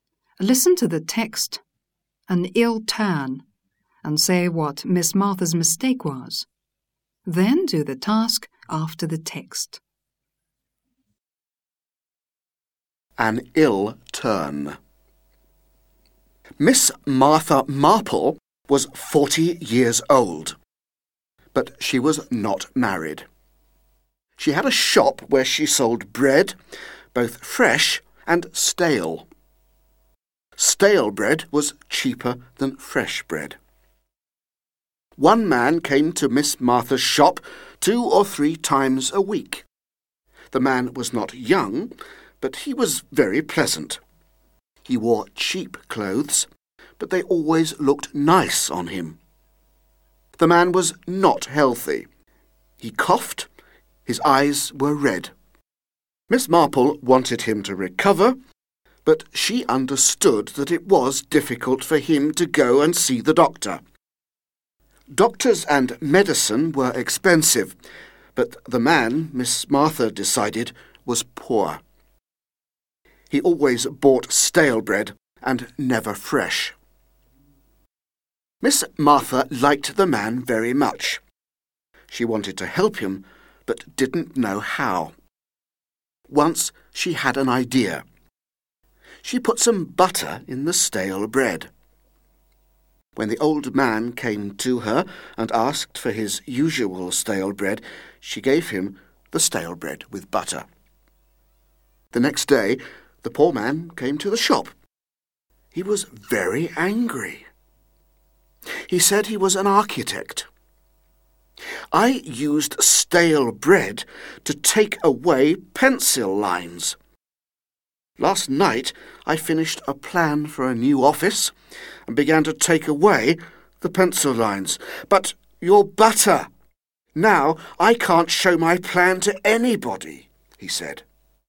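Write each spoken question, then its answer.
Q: Listen to the text, an ill turn, and say what Miss Martha's mistake was.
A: She thought he was poor and secretly put butter in his stale bread, but he used the bread to rub out pencil lines, so the butter spoiled his plan.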